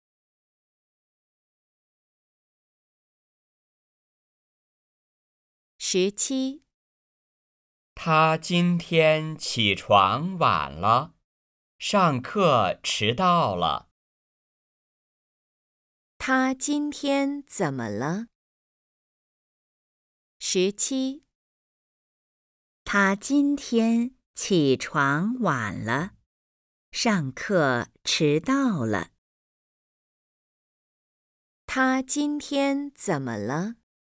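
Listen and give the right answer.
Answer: 起床晚了,上课迟到了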